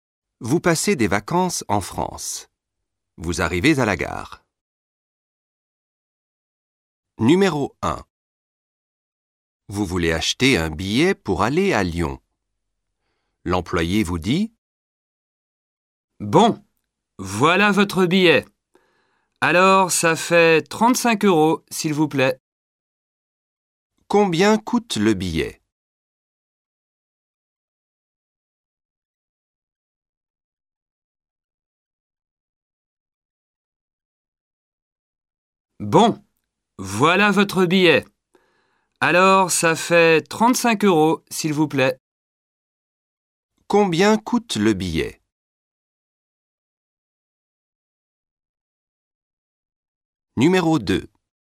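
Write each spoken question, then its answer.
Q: Combien coûte le billet?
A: 35 euros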